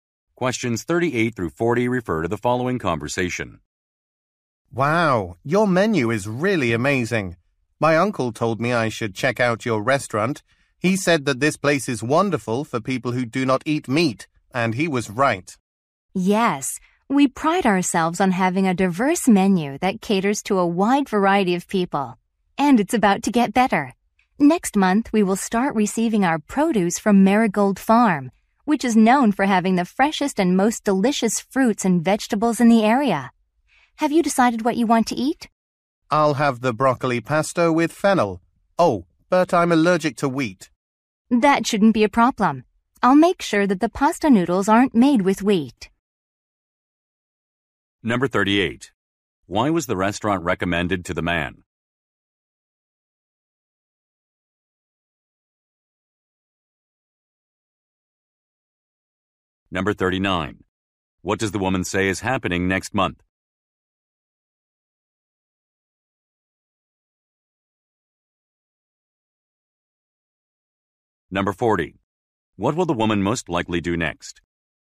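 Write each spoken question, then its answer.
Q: Why was the restaurant recommended to the man?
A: It is good for people who don't eat meat

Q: What does the woman say is happening next month?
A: The restaurant will get produce from Marigold Farm

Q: What will the woman most likely do next?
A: Make sure the pasta is not made with wheat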